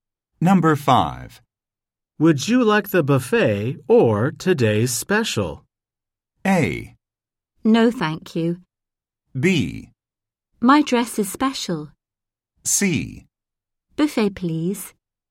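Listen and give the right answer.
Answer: C: Buffet, please.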